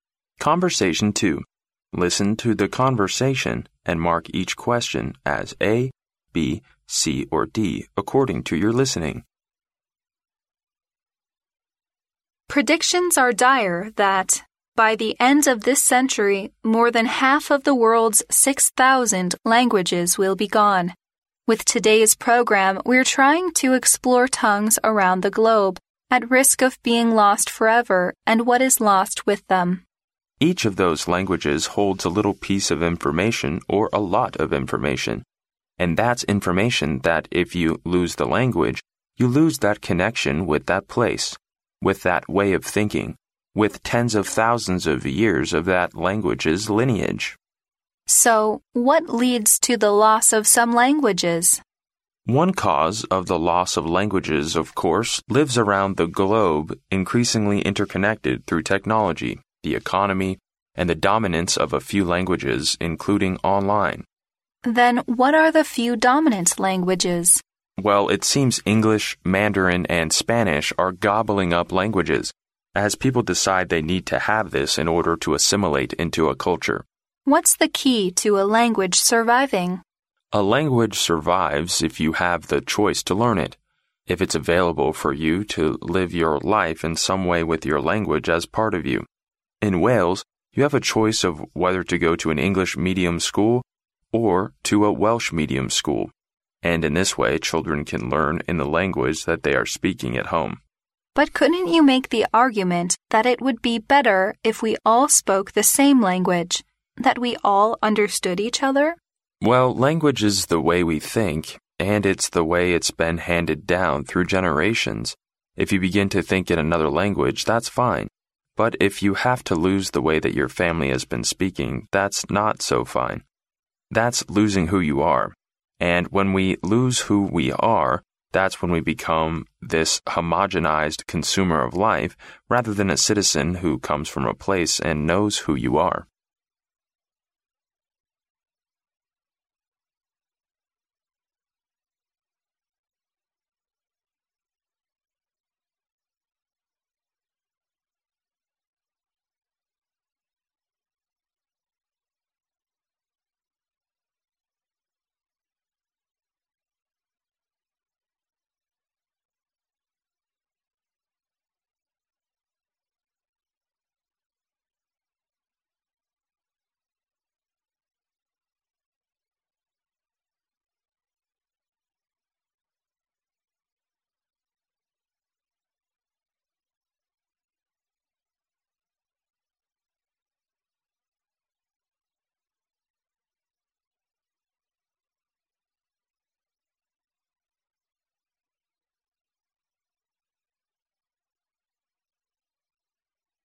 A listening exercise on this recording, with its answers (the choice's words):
Listen to the conversation, and mark each question as A, B, C or D according to your listening.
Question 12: Which language below is mentioned as a dominant one?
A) Japanese.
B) French.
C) Mandarin.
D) Russian.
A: Mandarin.

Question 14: How can we keep languages alive according to the man?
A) Record all the languages.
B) Develop both the oral and written forms.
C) Popularize the knowledge of their origins.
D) Live with them as if they were part of us.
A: Live with them as if they were part of us.

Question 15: What are the speakers mainly talking about?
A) The survival and disappearance of languages.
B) The replacement of old languages by the new ones.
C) Differences among various languages.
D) Regional languages now rarely used.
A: The survival and disappearance of languages.

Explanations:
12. 女士问到世界上有哪几种语言是占主导地位的?男士回答有英语、汉语普通话和西班牙语。符合录音内容的只有C项"汉语普通话"。
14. 根据男士的话A language survives if you have the choice...your language as part of you,可得出当你学习一种语言,并把它当作生活的一部分时,这种语言才能存留下来。故D项正确。
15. 录音主要讲的是如今很多语言濒临消失的现状、原因以及如何使这些语言存留下来。故A项正确。

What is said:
W: Predictions are dire that, by the end of this century, more than half of the world's 6,000 languages will be gone. With today's program we're trying to explore tongues around the globe at risk of being lost forever and what is lost with them.
M: Each of these languages holds a little piece of information or a lot of information. And that's information that, if you lose the language, you lose that connection with that place, with that way of thinking, with tens of thousands of years of that language's lineage.
W: So what leads to the loss of some languages?
M: One cause of the loss of languages, of course, lives around the globe increasingly interconnected through technology, the economy, and the dominance of a few languages, including online.
W: Then what are the few dominant languages?
M: Well, it seems English, Mandarin and Spanish are gobbling up languages, as people decide they need to have this in order to assimilate into a culture.
W: What's the key to a language surviving?
M: A language survives if you have the choice to learn it, if it's available for you to live your life in some way with your language as part of you. In Wales, you have a choice of whether to go to an English medium school or to a Welsh medium school. And in this way, children can learn in the language that they are speaking at home.
W: But couldn't you make the argument that it would be better if we all spoke the same language, that we all understood each other?
M: Well, language is the way we think. And it's the way it's been handed down through generations. If you begin to think in another language, that's fine. But if you have to lose the way that your family has been speaking, that's not so fine. That's losing who you are. And when we lose who we are, that's when we become this homogenized consumer of life, rather than a citizen who comes from a place and knows who you are.